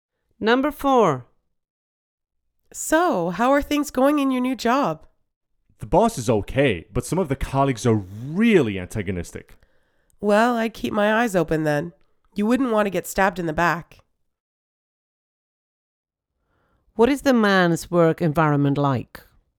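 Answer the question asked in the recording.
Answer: Some colleagues are hostile.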